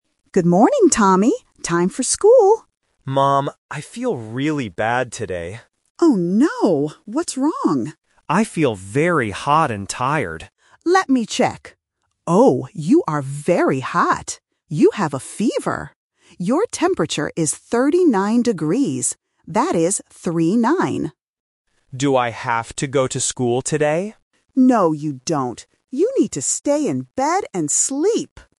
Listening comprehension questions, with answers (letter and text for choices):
Listen to the conversation. Circle the correct answer (A, B, or C).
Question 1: How does Tommy feel?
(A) Hot and tired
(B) Cold and tired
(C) Hungry and hot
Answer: (A) Hot and tired

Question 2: What is Tommy's temperature?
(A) 35 degrees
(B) 38 degrees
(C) 39 degrees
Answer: (C) 39 degrees

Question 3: What does Mom tell Tommy to do?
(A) Go to school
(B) Stay in bed and sleep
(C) Go see a doctor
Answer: (B) Stay in bed and sleep

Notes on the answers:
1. Tommy says exactly, "I feel very hot and tired." Option B is a trap because "cold" is a common illness word, but he didn't say it. Option C is wrong because "hungry" is not mentioned.
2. The mother clearly says "39 degrees" and repeats "That is 3-9" (A1 repetition technique). Options A (35) and B (38) are just traps using similar numbers.
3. The mother says, "You need to stay in bed and sleep." Option A (Go to school) is the main trap because Tommy asks about school, but the mother says "No, you don't." Option C (Go see a doctor) is a plausible action for a sick person, but it is not mentioned in the audio.

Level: A1